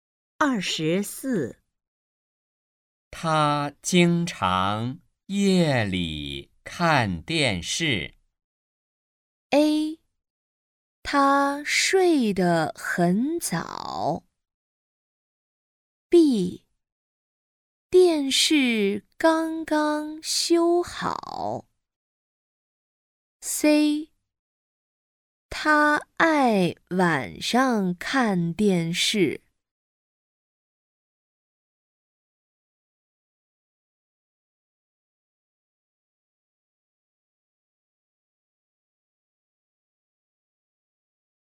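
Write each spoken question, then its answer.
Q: 他经常夜里看电视。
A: C: 他爱晚上看电视。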